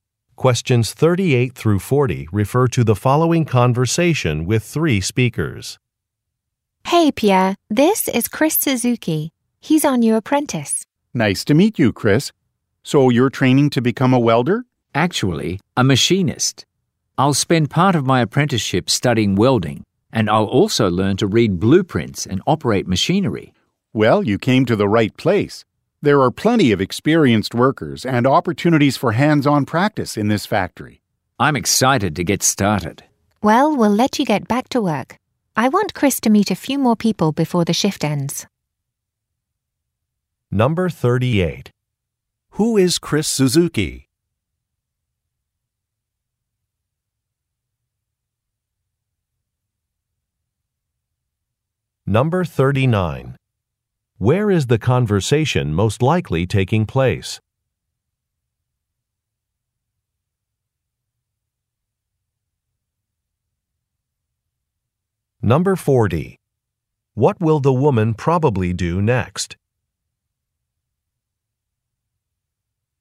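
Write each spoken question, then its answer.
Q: Who is Chris Suzuki?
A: A new apprentice training to become a machinist

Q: Where is the conversation most likely taking place?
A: In a factory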